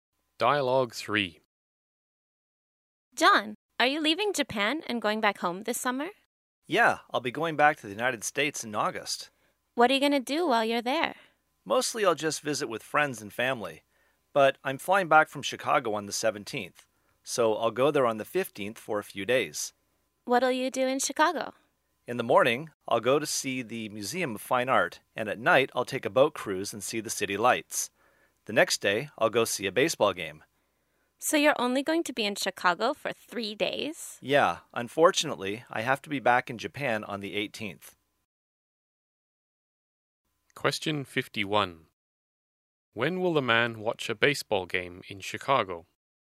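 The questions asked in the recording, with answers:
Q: When will the man watch a baseball game in Chicago?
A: On the 16th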